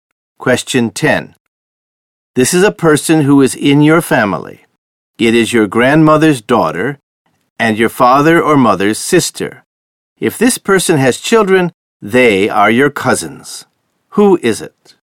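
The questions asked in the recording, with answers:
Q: Who is it?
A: Your aunt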